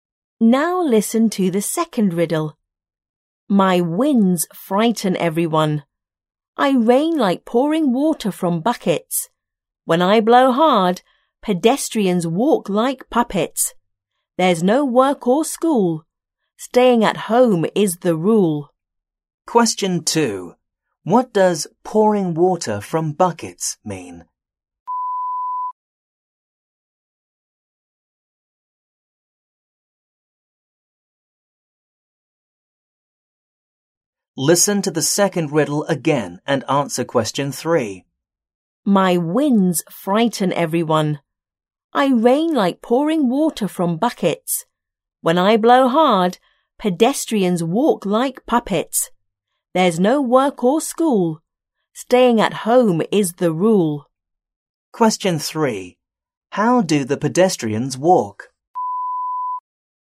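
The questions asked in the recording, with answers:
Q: What does pouring water from buckets mean?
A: It is raining very heavily

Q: How do the pedestrians walk?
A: Like puppets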